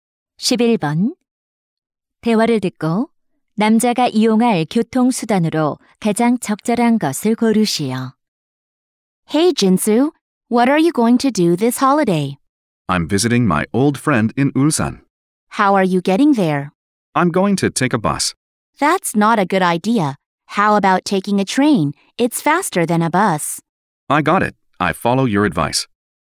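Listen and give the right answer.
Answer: 기차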